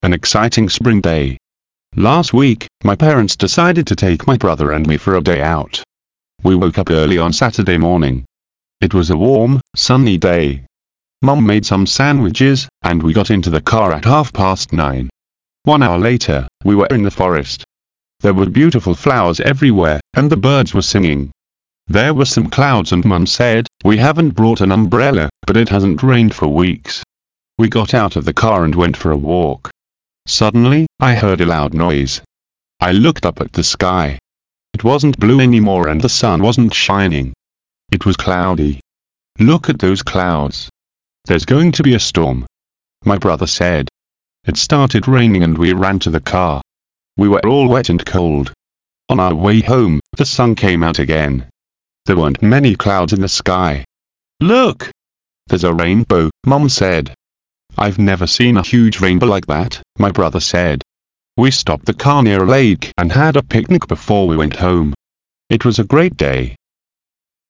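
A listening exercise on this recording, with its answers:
Listen to the text and fill in the blanks.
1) Last week, my parents decided to take my and me for a day out.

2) We woke up on Saturday morning.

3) Mum some sandwiches and we got into the car at half nine.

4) One later, we were in the forest.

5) There were some and Mum said,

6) "We haven't brought an , but it hasn't rained for weeks.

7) We got out of the car and went for a .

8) Suddenly I a loud noise.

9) It wasn't anymore and the sun wasn't shining.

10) "Look at clouds.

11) It started raining and we to the car.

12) We were all and cold.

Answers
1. brother
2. early
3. made
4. hour
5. clouds
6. umbrella
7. walk
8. heard
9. blue
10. those
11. ran
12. wet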